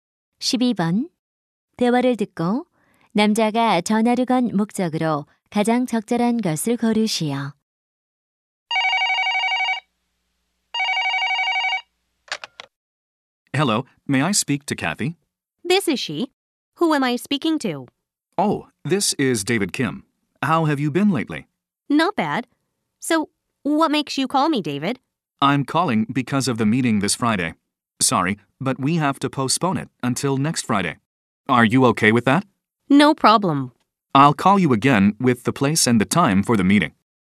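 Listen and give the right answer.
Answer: 회의를 연기하려고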